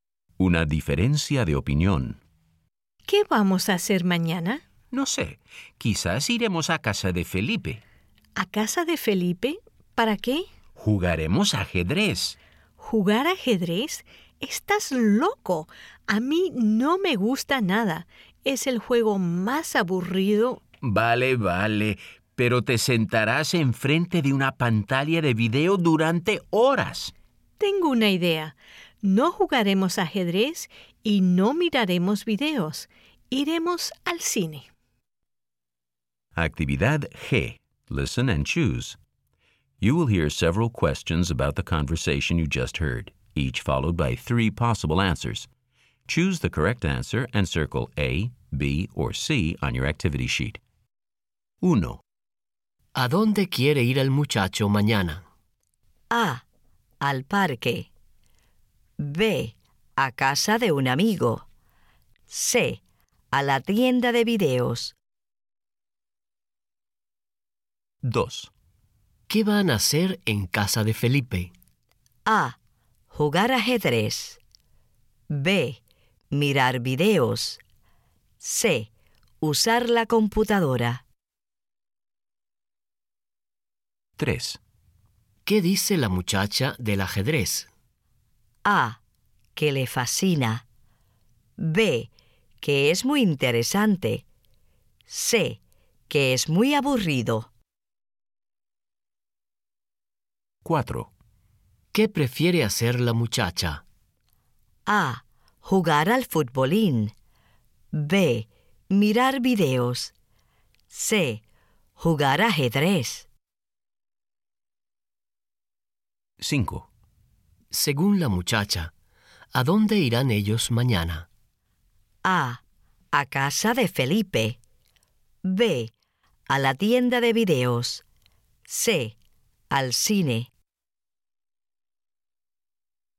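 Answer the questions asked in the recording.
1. B: A casa de un amigo.
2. A: Jugar ajedrez.
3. C: Que es muy aburrido.
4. B: Mirar videos.
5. C: Al cine.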